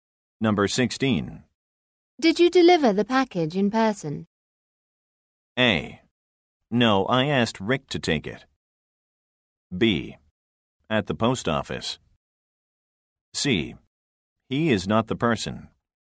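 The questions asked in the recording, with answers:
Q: Did you deliver the package in person?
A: A: No, I asked Rick to take it.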